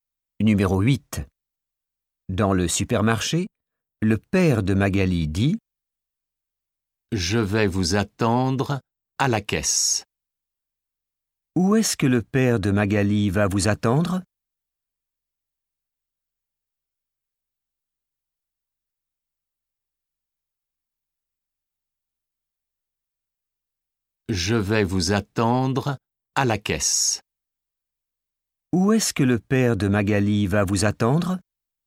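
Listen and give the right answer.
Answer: à la caisse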